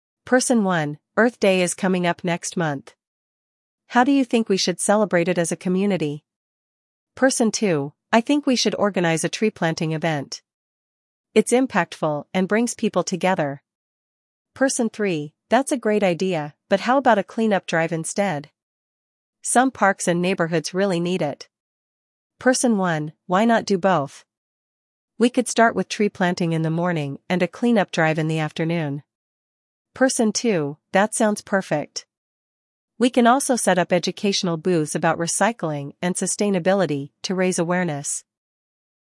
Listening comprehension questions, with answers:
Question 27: What event does Person 2 suggest?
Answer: Tree-planting

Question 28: What is Person 3's suggestion?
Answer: A clean-up drive

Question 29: How does Person 1 combine both ideas?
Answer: Combining both events

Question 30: What additional activity does Person 2 propose?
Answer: Educational booths

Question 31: When will the clean-up drive take place?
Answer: In the afternoon

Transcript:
Person 1: Earth Day is coming up next month. How do you think we should celebrate it as a community?
Person 2: I think we should organize a tree-planting event. It's impactful and brings people together.
Person 3: That's a great idea, but how about a clean-up drive instead? Some parks and neighborhoods really need it.
Person 1: Why not do both? We could start with tree-planting in the morning and a clean-up drive in the afternoon.
Person 2: That sounds perfect. We can also set up educational booths about recycling and sustainability to raise awareness.